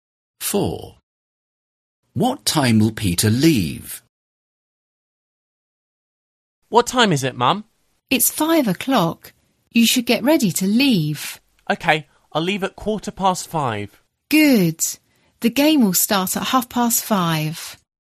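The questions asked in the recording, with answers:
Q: What time will Peter leave?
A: 5:15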